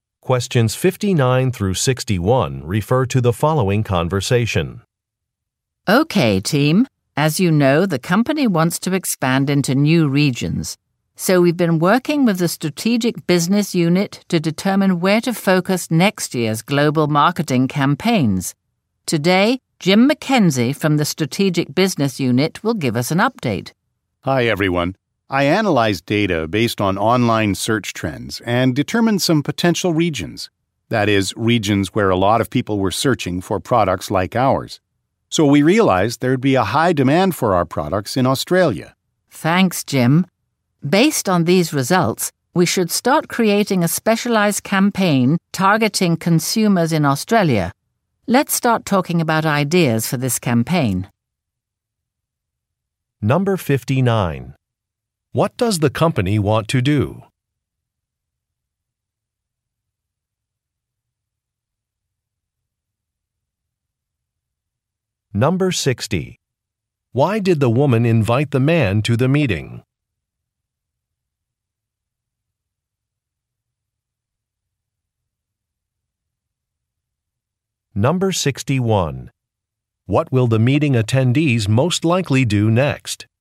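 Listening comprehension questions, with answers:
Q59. What does the company want to do?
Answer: Expand into new markets

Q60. Why did the woman invite the man to the meeting?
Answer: To present the results of data analysis

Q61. What will the meeting attendees most likely do next?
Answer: Discuss some marketing ideas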